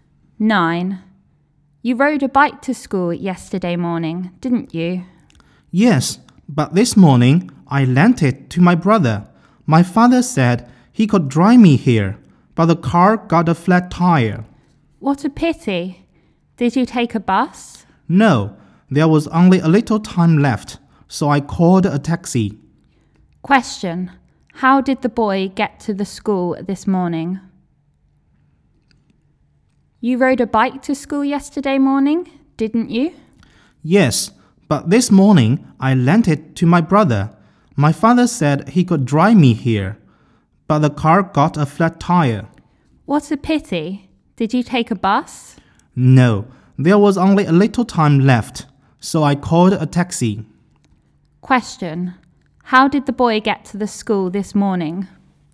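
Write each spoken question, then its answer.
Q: How did the boy get to the school this morning?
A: By taxi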